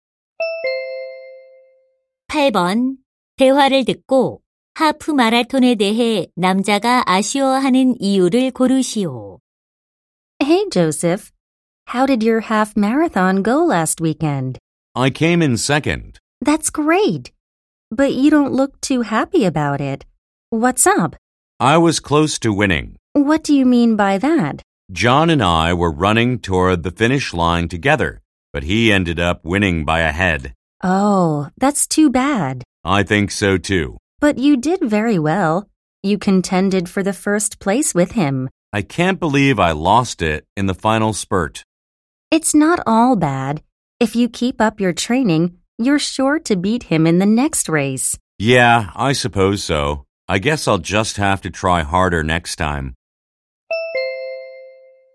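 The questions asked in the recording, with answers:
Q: 대화를 듣고 하프 마라톤에 대해 남자가 아쉬워하는 이유를 고르시오.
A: 마지막 스퍼트에서 져서 근소한 차이로 1등을 놓쳐서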